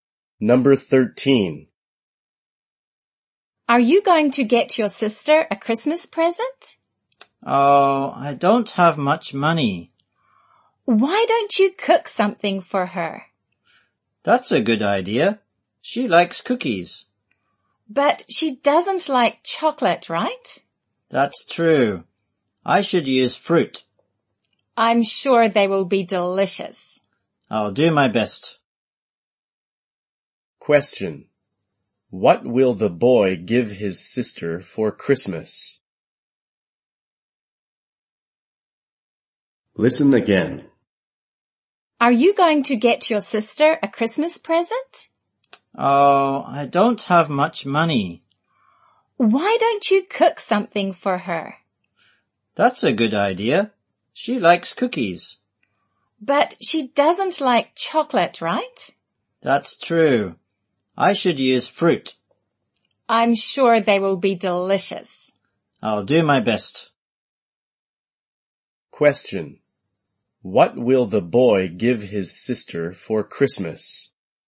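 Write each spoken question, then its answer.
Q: What will the boy give his sister for Christmas?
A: Fruit cookies he makes himself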